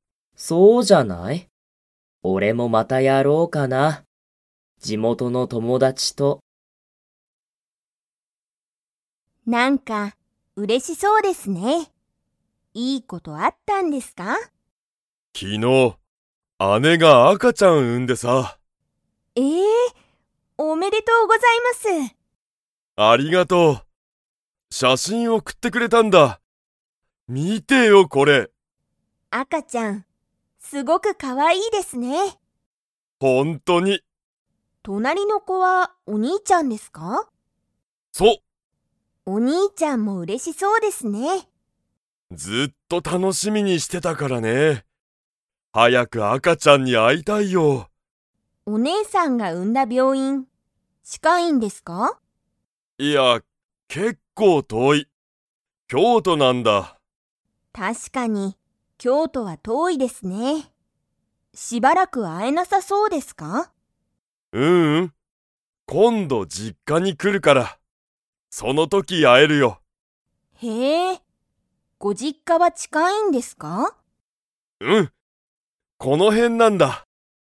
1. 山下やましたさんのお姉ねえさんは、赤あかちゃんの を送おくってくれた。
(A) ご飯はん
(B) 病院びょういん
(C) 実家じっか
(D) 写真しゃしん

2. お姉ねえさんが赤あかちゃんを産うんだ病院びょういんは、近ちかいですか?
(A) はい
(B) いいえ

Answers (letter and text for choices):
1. (D) 写真しゃしん
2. (B) いいえ

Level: Level 4